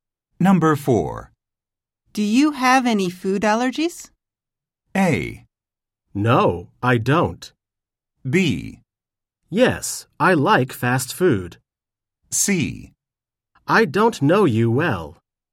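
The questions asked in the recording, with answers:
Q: Do you have any food allergies?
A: A: No, I don't.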